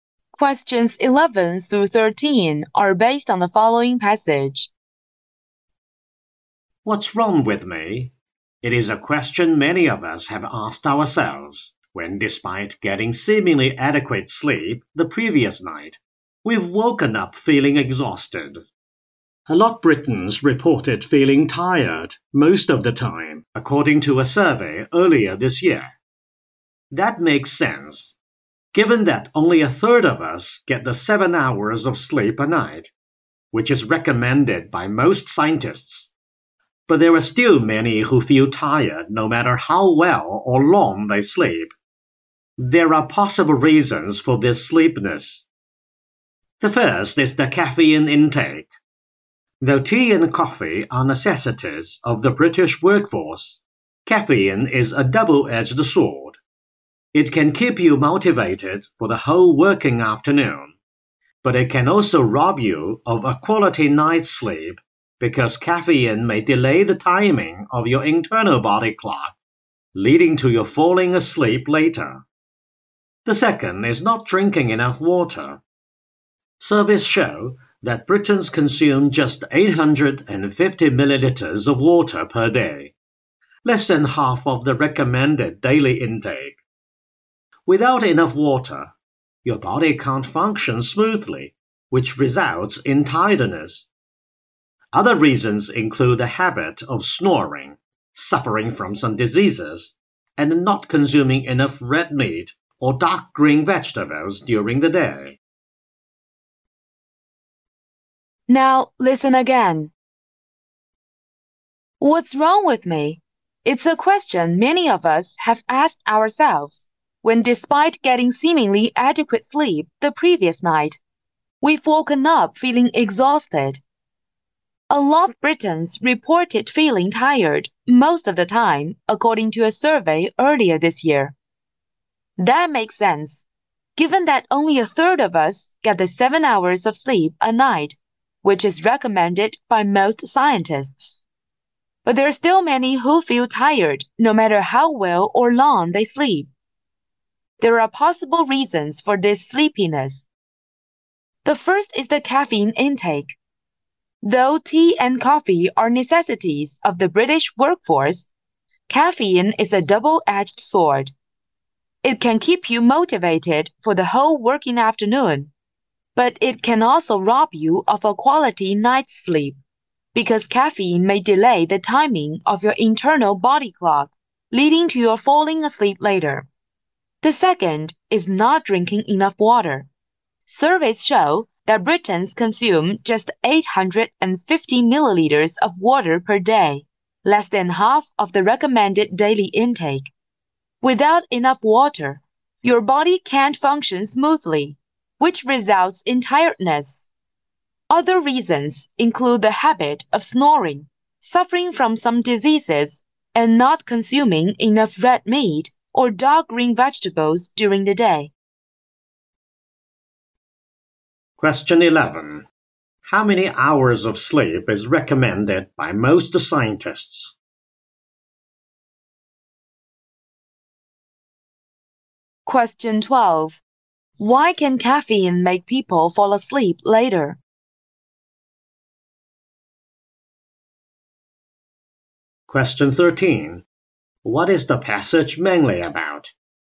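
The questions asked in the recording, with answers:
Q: How many hours of sleep is recommended by most scientists?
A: 7 hours

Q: Why can caffeine make people fall asleep later?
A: It may delay the timing of the internal body clock

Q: What is the passage mainly about?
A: Possible reasons why people feel tired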